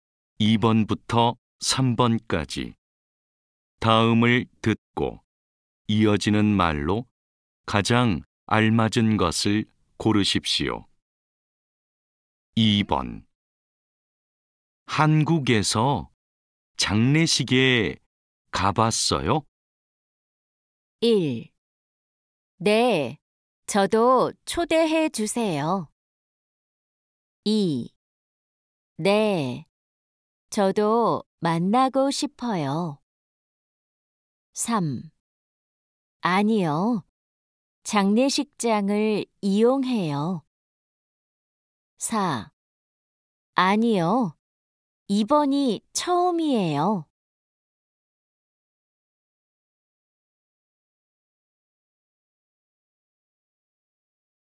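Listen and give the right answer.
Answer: 4: 아니요, 이번이 처음이에요.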